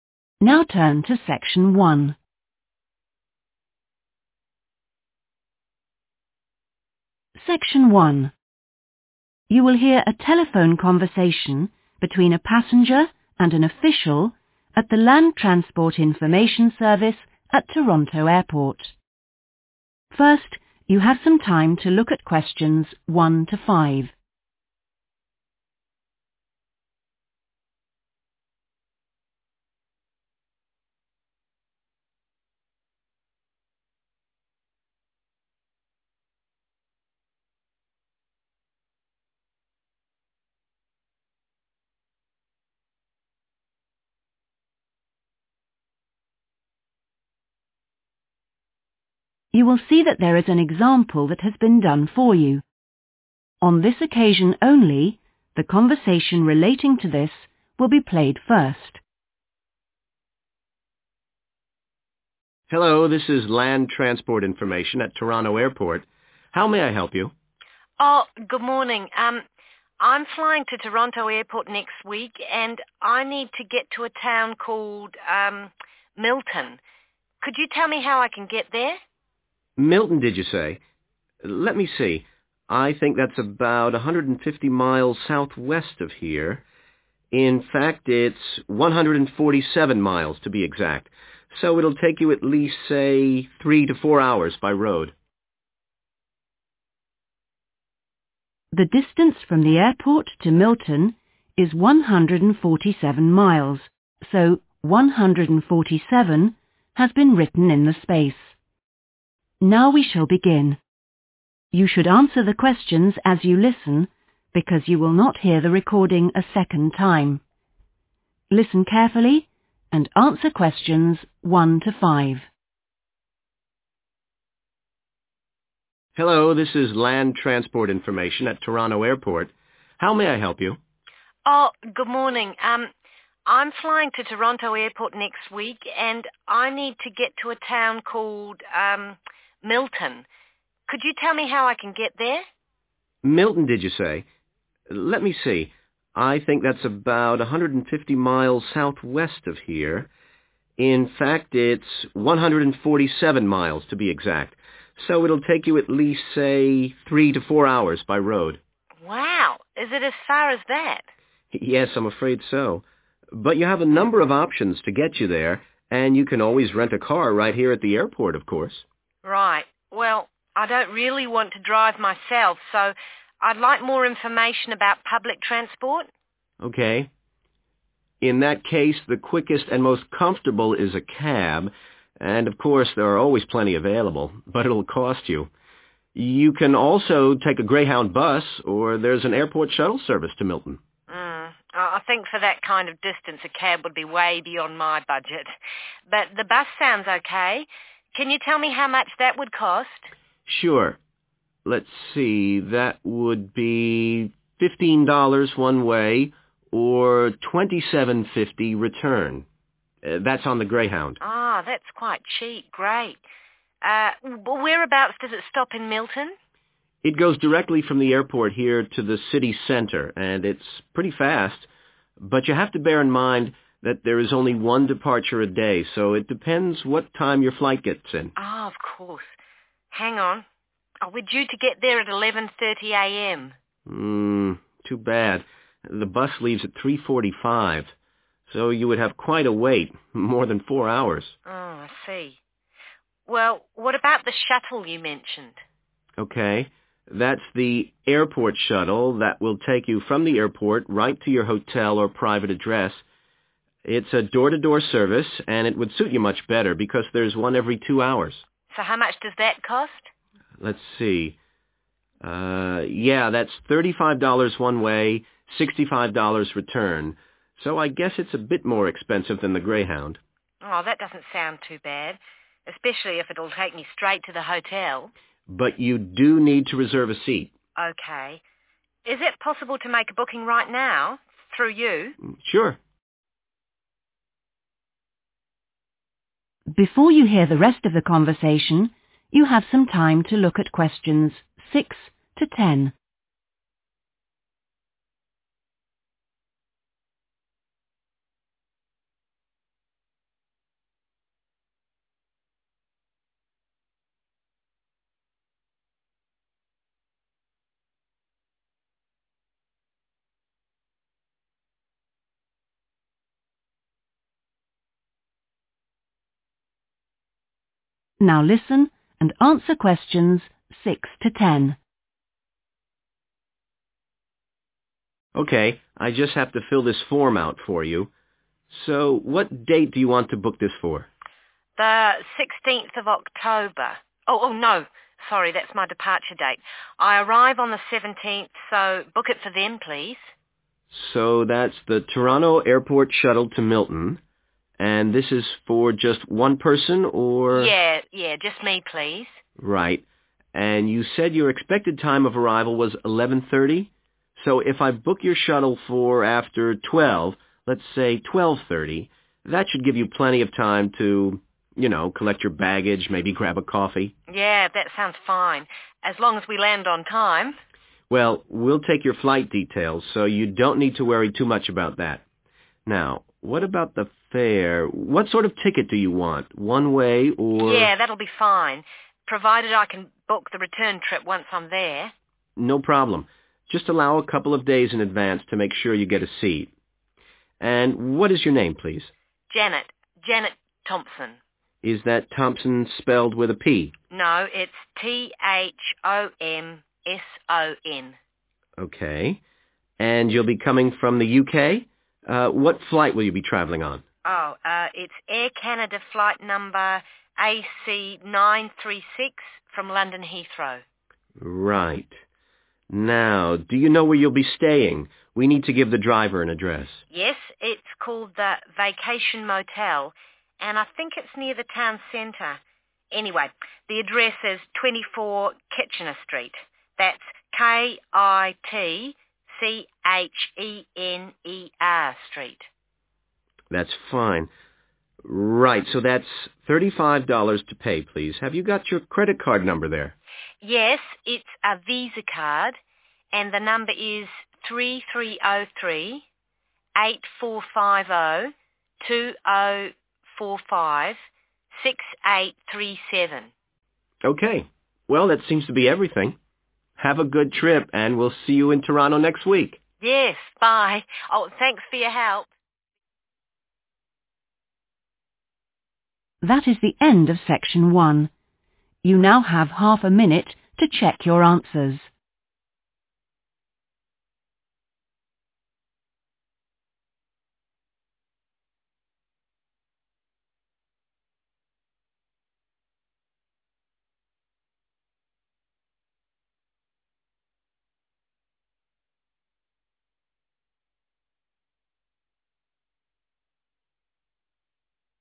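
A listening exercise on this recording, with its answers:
Complete the notes below. Write NO MORE THAN THREE WORDS for each answer.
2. – direct to the 2_______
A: city centre

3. – long 3_______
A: wait

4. – 4_______service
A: door-to-door

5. – need to 5_______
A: reserve a seat

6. Date: 6_______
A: 17th October

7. Bus Time: 7_______ PM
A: 12:30

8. Name: Janet 8_______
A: Thomson

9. Flight No: 9_______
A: AC936

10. Credit Card No: (Visa) 10_______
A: 3303 8450 2045 6837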